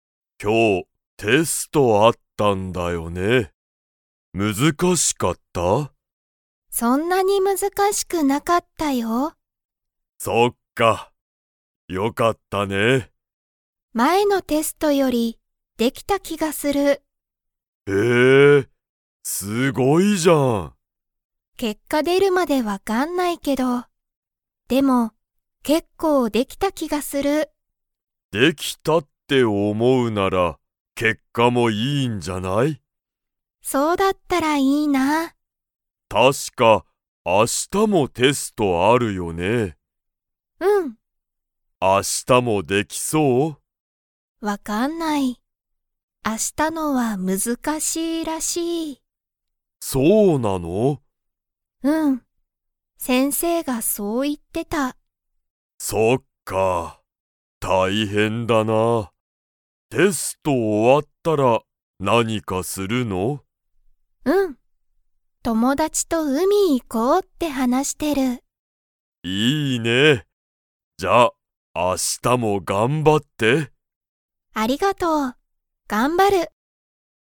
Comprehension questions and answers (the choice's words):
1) 今日きょうのテストは難むずかしかったですか?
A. はい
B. いいえ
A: いいえ

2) アミはテストが終おわったら、____。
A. 結果けっかがすぐ出でてほしい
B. テストは頑張がんばりたくない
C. 友達ともだちと海うみに行いきたい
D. 頑張がんばって勉強べんきょうしたい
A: 友達ともだちと海うみに行いきたい

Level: Level 2